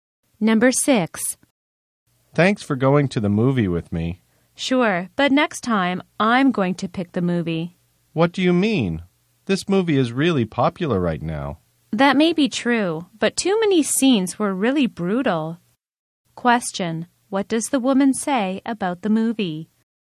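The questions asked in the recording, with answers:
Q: What does the woman say about the movie?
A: Too many scenes were really brutal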